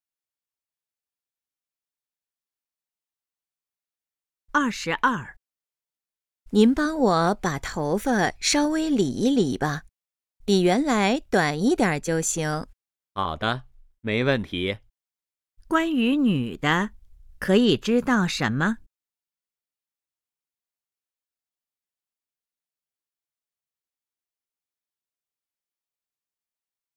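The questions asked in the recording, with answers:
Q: 关于女的,可以知道什么?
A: 想理发,剪短一点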